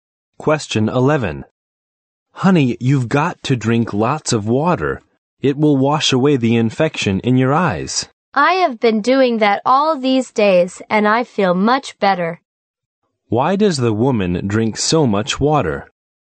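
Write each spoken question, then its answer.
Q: Why does the woman drink so much water?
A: To wash away the infection in her eyes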